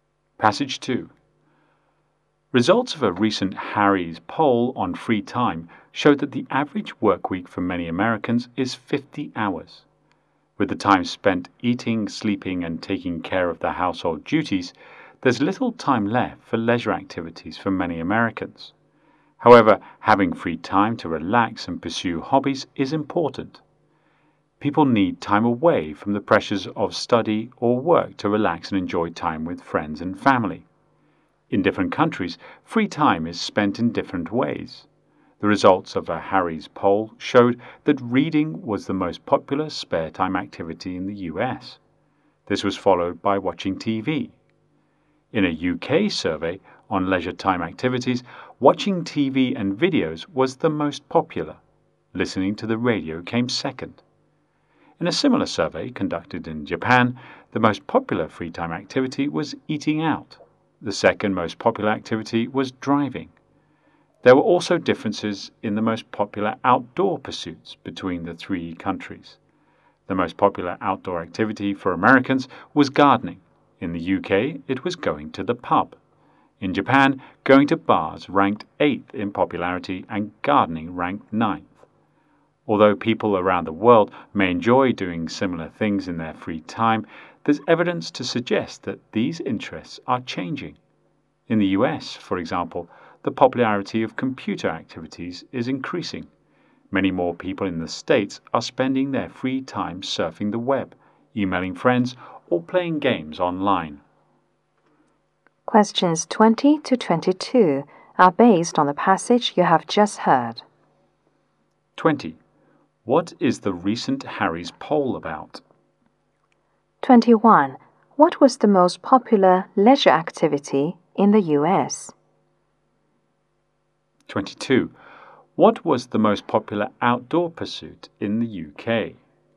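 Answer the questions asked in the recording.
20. How people spend their free time.
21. Reading.
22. Going to the pub.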